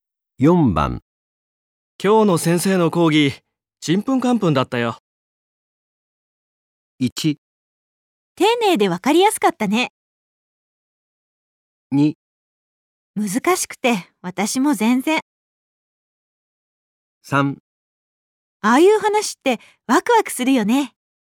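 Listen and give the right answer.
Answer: 2: 難しくて、私も全然。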